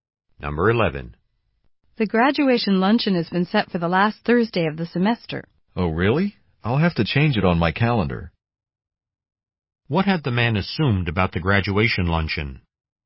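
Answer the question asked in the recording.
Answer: That it was on a different date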